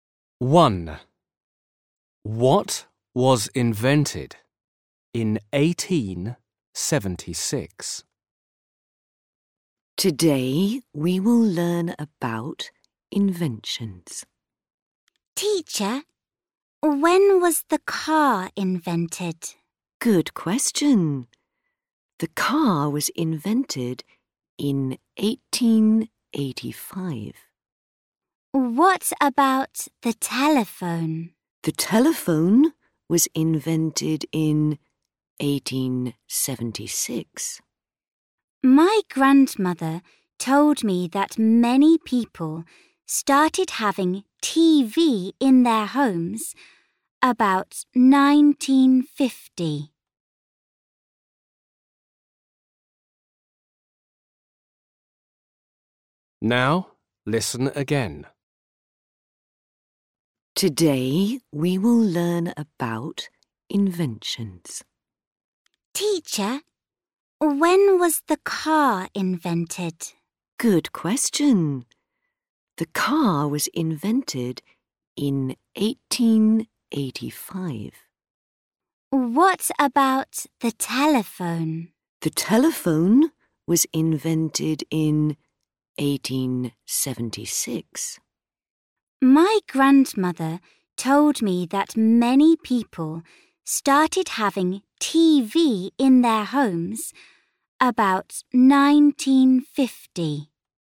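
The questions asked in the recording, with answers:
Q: What was invented in 1876.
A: the telephone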